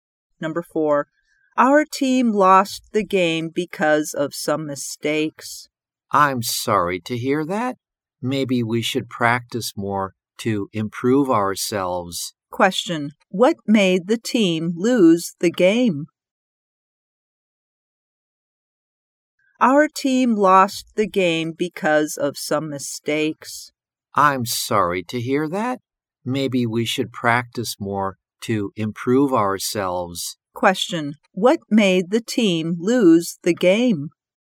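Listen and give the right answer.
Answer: Some mistakes.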